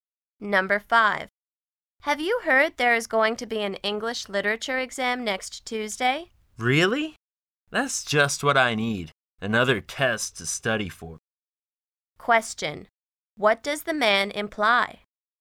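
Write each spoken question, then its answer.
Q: What does the man imply?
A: He doesn't want another test to study for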